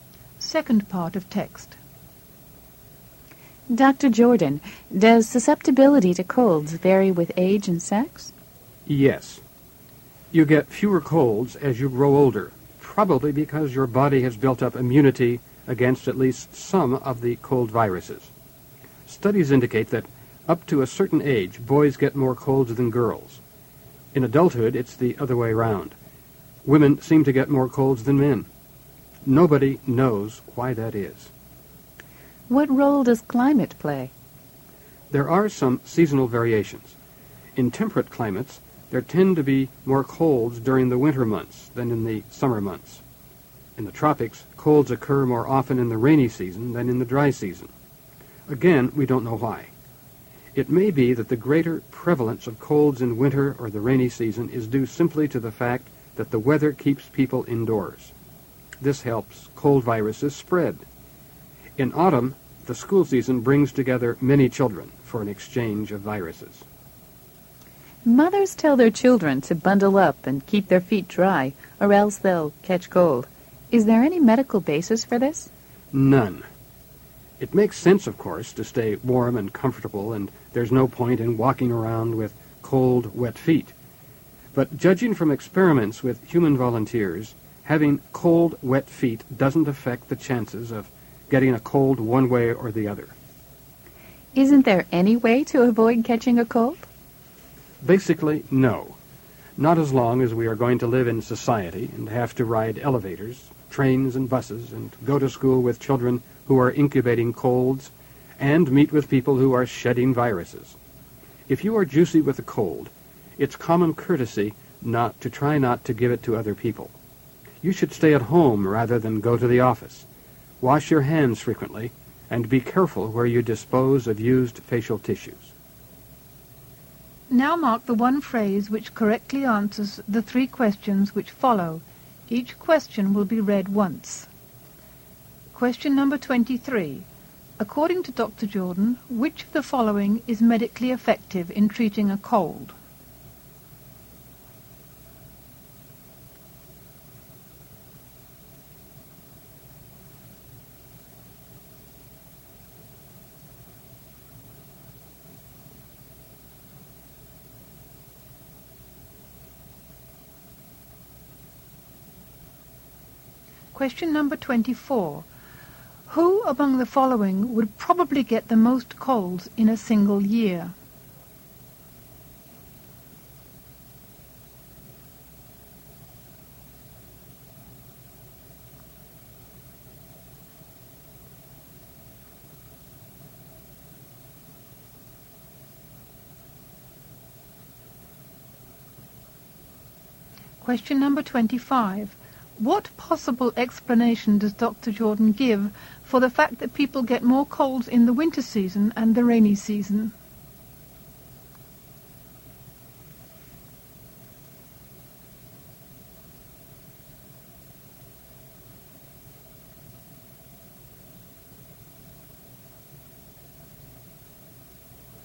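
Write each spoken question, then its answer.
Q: What possible explanation does Dr. Jordan give for the fact that people get more colds in the winter season and the rainy season?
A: The weather keeps people indoors, which helps cold viruses spread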